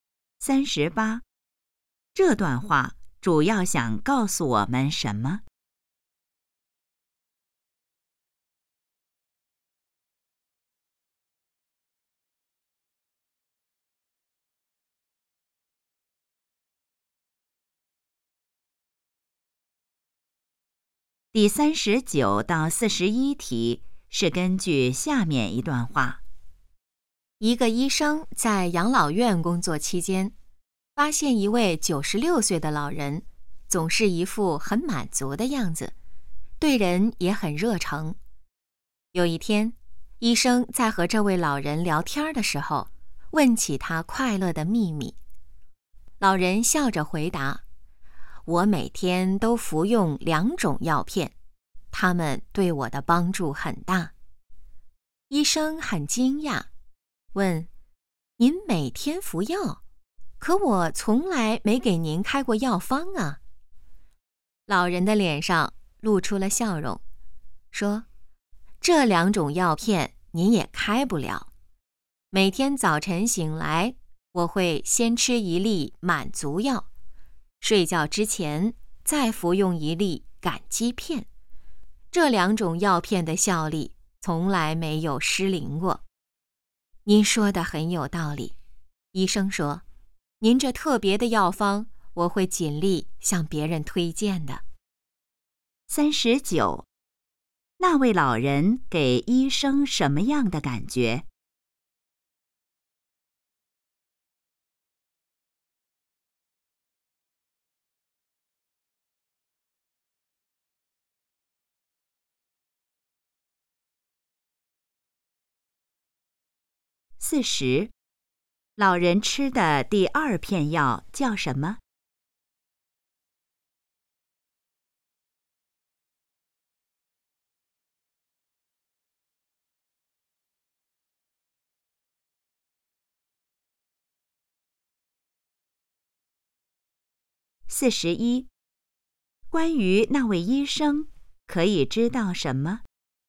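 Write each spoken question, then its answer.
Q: 那位老人给医生什么样的感觉?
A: 很满足,对人热诚

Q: 老人吃的第二片药叫什么?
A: 感激片

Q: 关于那位医生,可以知道什么?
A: 会向别人推荐老人的药方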